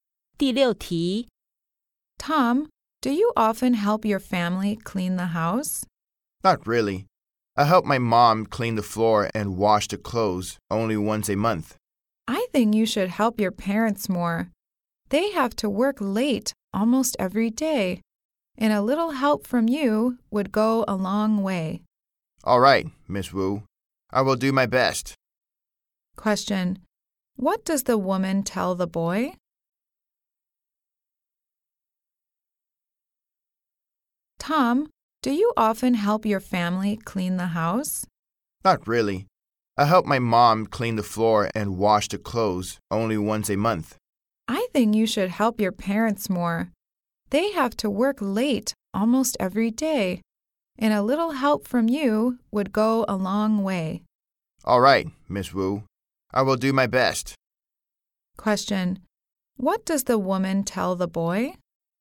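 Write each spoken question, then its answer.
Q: What does the woman tell the boy?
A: He should help his parents more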